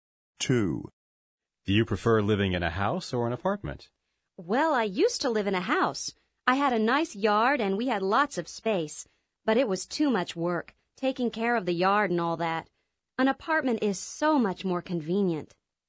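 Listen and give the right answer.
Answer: An apartment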